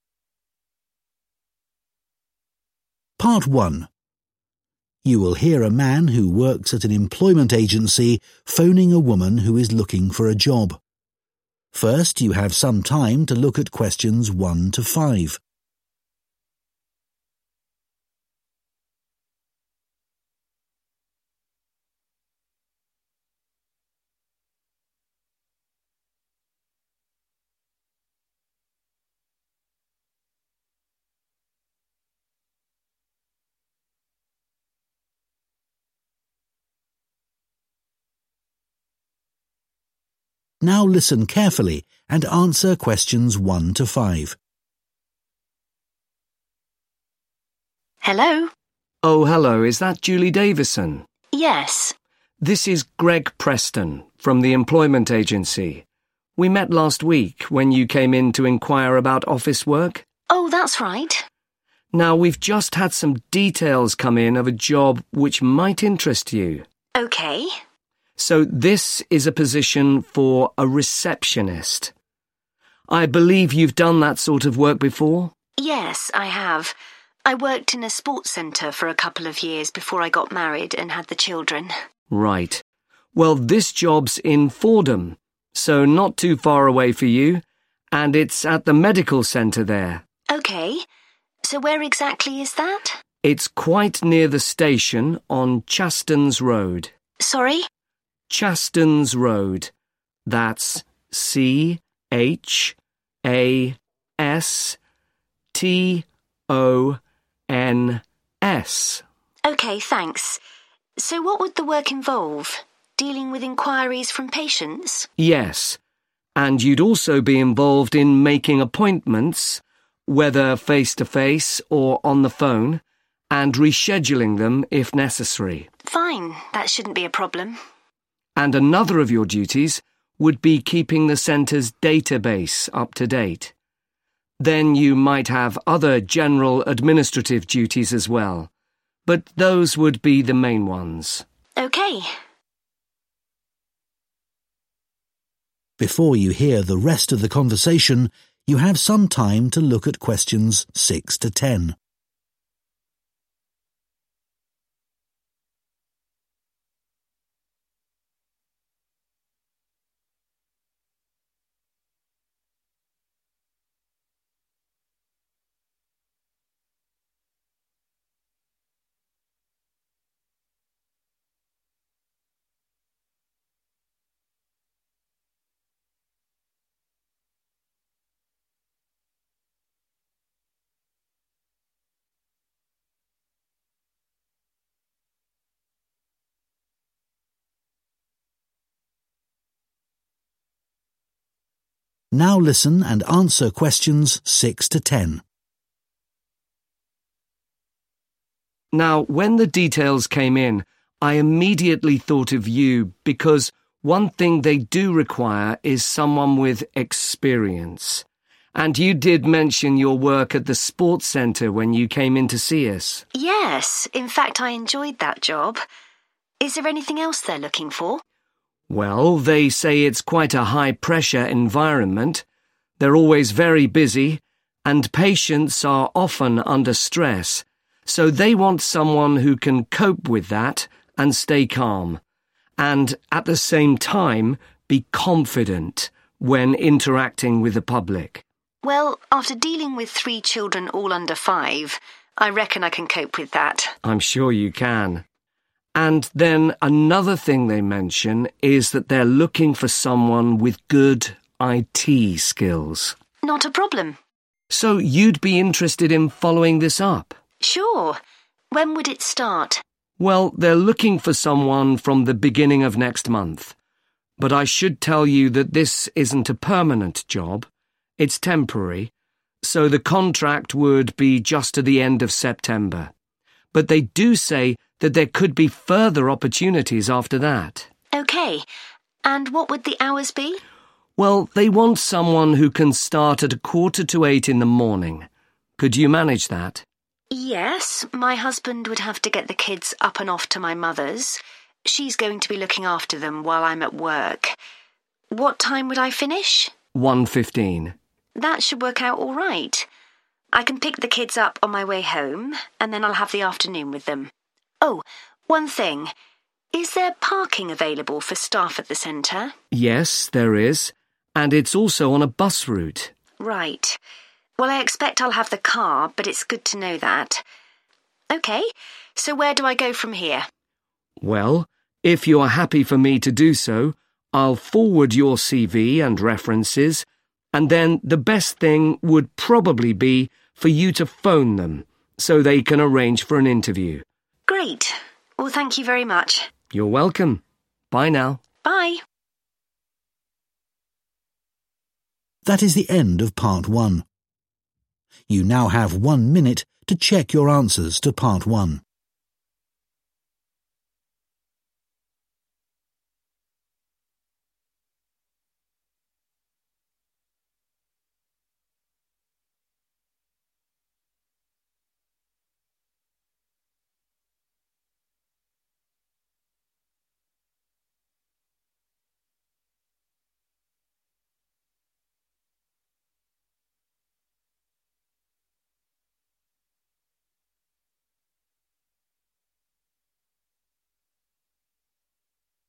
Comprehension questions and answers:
Complete the notes below. Write ONE WORD AND/ OR A NUMBER ONLY for each answer.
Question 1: Role: (1)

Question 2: Location: Fordham (2) Centre, (3) Road, Fordham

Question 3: Location: Fordham (2) Centre, (3) Road, Fordham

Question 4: making (4) and reorganising them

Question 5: maintaining the internal (5)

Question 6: (6) (essential)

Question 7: a calm and (7) manner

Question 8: a (8) job – further opportunities may be available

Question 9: hours: 7.45 am to (9) p.m. Monday to Friday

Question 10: (10) is available onsite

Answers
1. Receptionist
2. Medical
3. Chastens
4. Appointments
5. Database
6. Experience
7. Confident
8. Temporary
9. 1.15
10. Parking